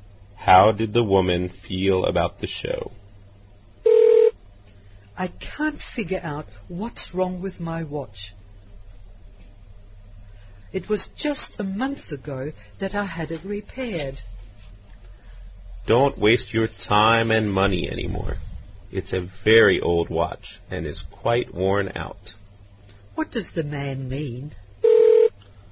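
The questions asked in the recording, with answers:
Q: What does the man mean?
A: The watch isn't worth repairing again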